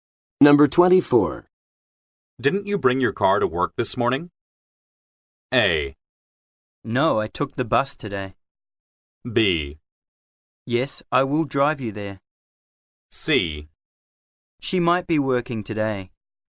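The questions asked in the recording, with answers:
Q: Didn't you bring your car to work this morning?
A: A: No, I took the bus today.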